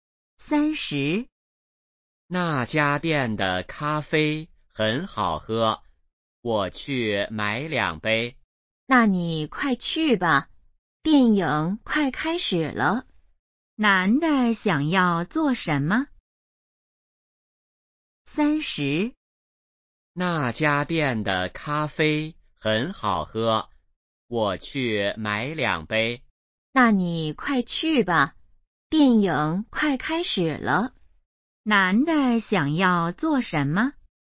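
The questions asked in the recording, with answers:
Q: 男的想要做什么?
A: 买咖啡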